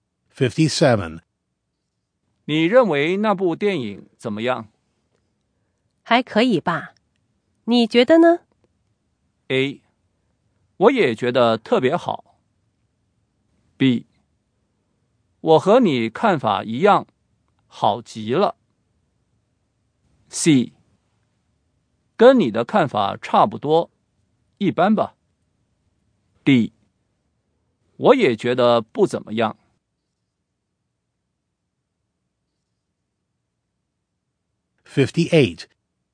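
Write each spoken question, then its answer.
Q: 还可以吧。你觉得呢?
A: C: 跟你的看法差不多,一般吧。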